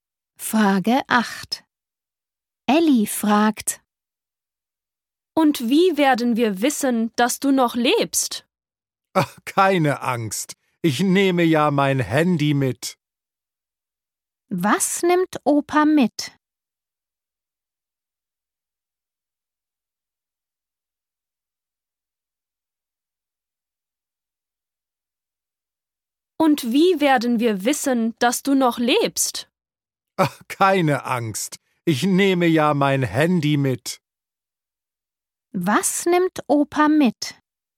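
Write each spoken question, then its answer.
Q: Was nimmt Opa mit?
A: sein Handy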